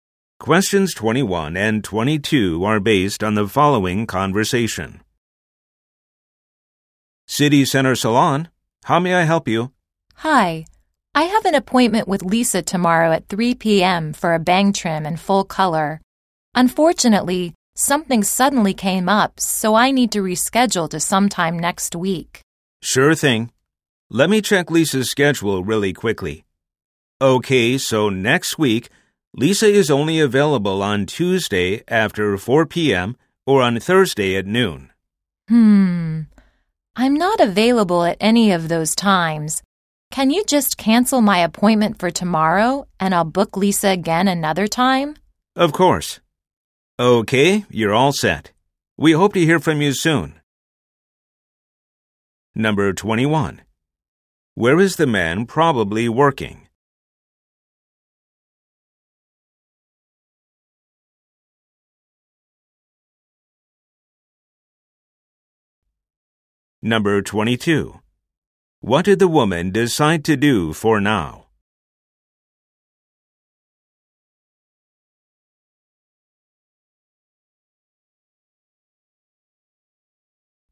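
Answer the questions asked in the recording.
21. At a hair salon
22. Cancel her appointment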